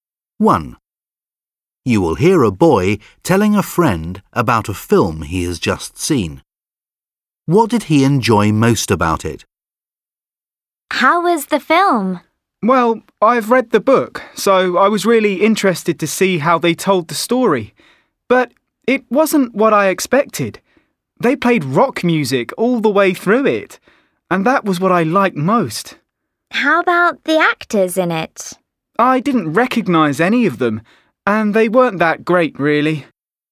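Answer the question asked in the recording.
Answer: The rock music in it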